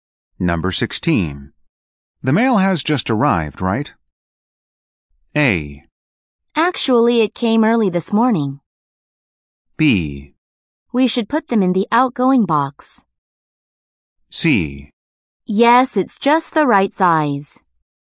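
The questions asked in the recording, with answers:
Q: The mail has just arrived, right?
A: A: Actually, it came early this morning.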